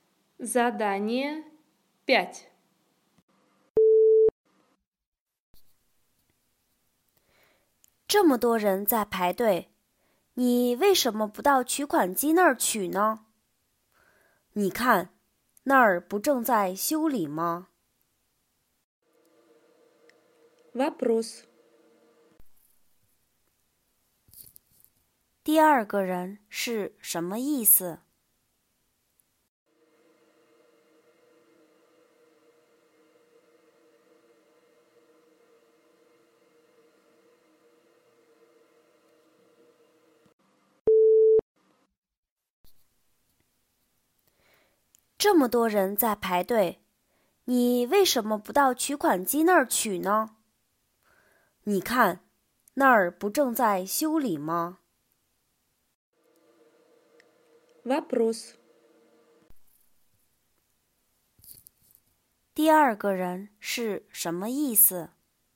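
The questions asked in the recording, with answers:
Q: 第二个人是什么意思?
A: 取款机正在修理,不能用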